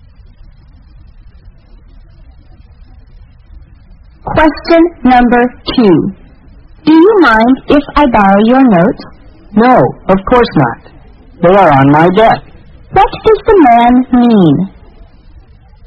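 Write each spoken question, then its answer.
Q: What does the man mean?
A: He doesn't mind lending his notes; they are on his desk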